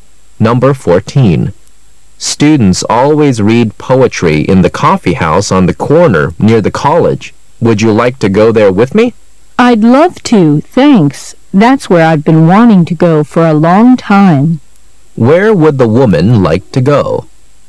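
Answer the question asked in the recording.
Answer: To the coffee house on the corner near the college, where students read poetry.

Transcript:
[解析] M: Students always read poetry in the coffee house on the corner near the college.Would you like to go there with me? W: I'd love to,thanks.That's where I've been wanting to go for a long time, Q: Where would the woman like to go?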